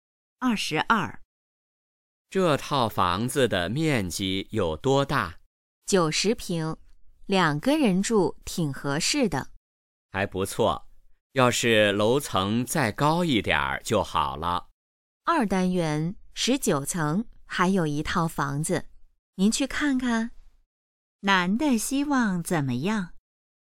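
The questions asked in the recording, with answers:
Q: 男的希望怎么样?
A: 楼层再高一点儿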